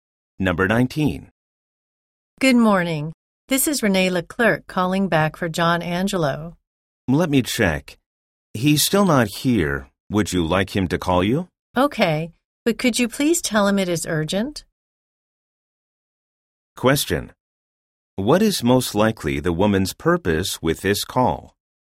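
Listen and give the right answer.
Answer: To reach John Angelo about something urgent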